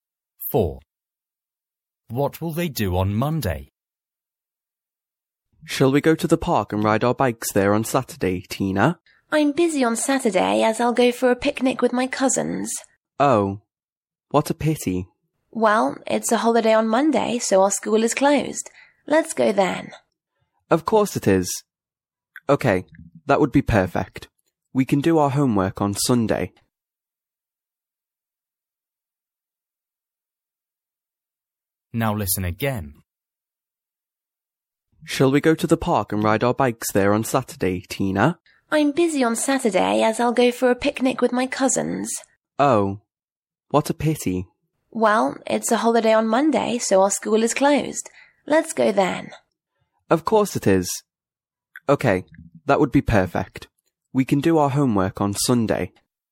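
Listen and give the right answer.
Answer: Ride their bikes in the park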